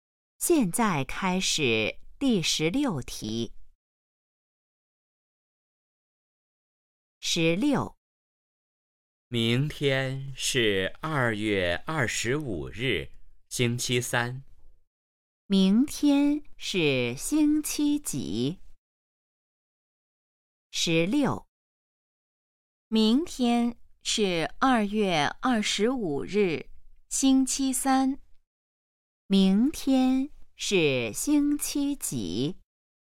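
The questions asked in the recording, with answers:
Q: 明天是星期几?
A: 星期三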